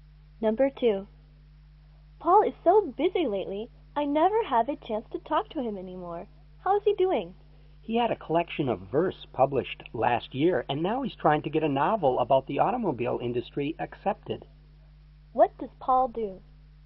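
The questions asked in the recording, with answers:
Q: What does Paul do?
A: He's a writer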